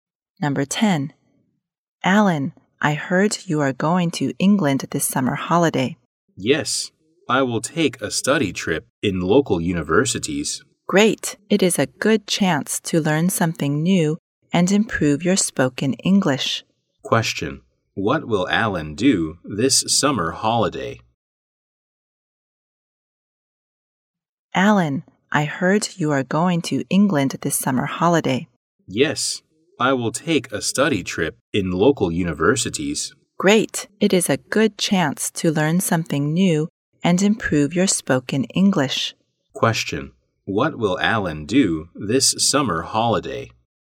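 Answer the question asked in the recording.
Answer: Take a study trip in England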